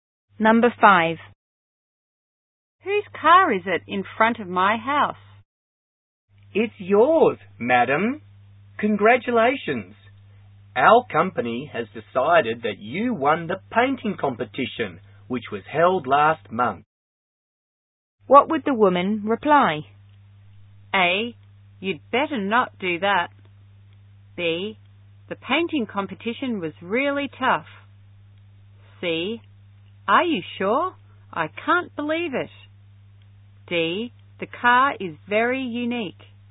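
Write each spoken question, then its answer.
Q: What would the woman reply?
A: C: Are you sure? I can't believe it.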